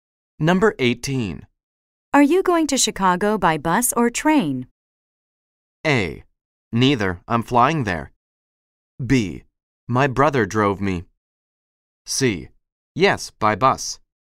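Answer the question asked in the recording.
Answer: A: Neither, I'm flying there.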